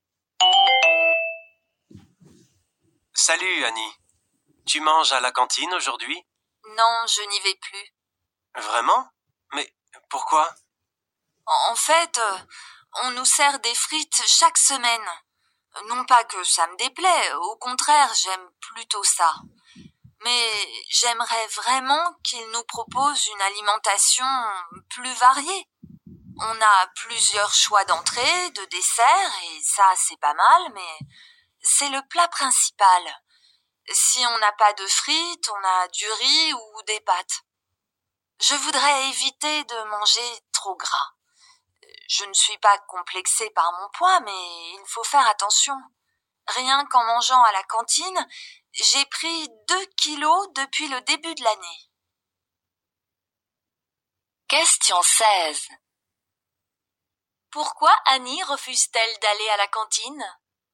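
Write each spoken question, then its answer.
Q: Pourquoi Annie refuse-t-elle d'aller à la cantine?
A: Les plats principaux ne sont pas variés et trop gras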